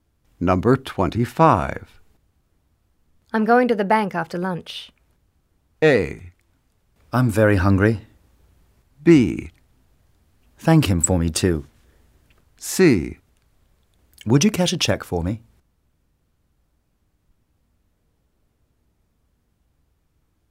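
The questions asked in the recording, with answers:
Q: I'm going to the bank after lunch.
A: C: Would you cash a check for me?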